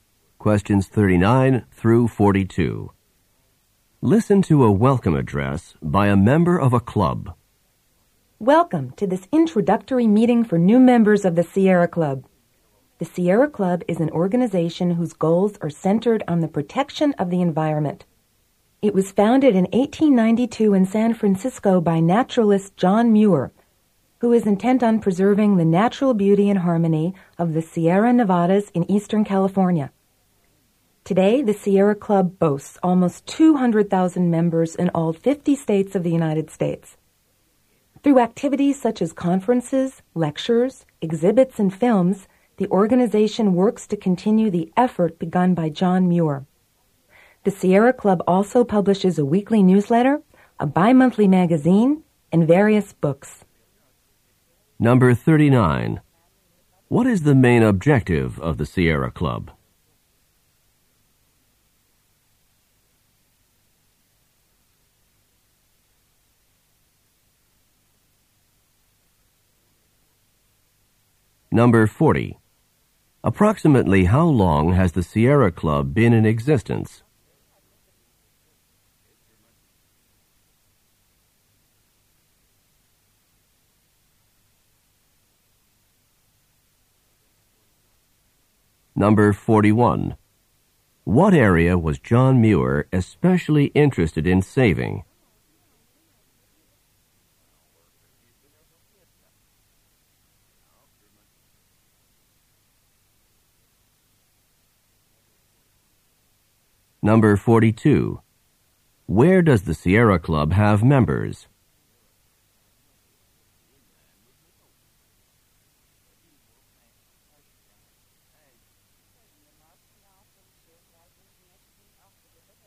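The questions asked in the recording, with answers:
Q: What is the main objective of the Sierra Club?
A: Protecting the environment

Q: What area was John Muir especially interested in saving?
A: The Sierra Nevadas in eastern California

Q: Where does the Sierra Club have members?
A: In all 50 U.S. states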